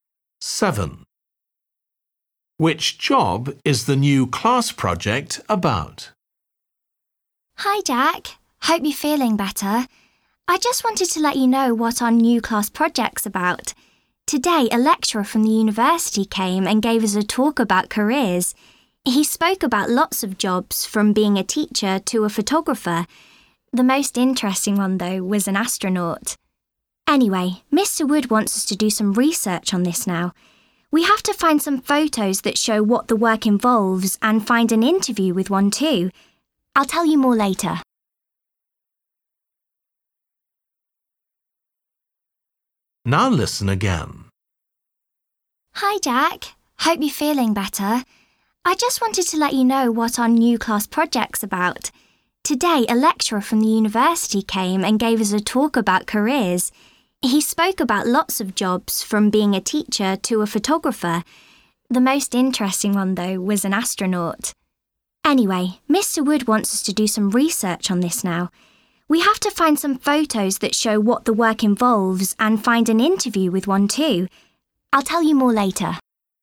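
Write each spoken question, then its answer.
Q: Which job is the new class project about?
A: astronaut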